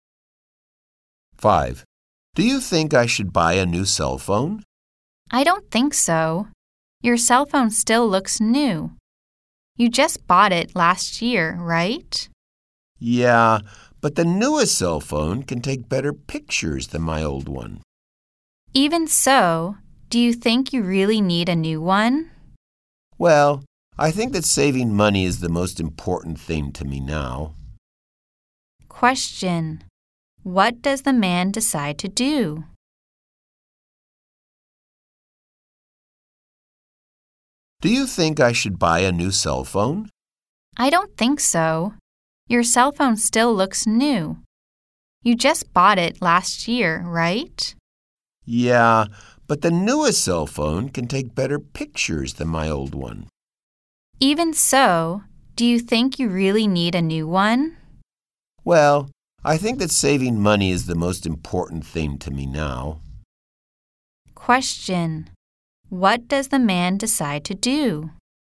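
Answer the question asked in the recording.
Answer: Not to buy a new cell phone; he will save money.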